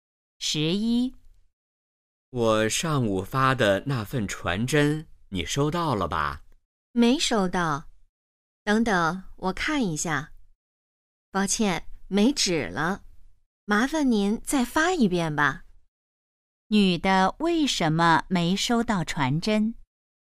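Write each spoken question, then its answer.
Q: 女的为什么没收到传真?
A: 传真机没纸了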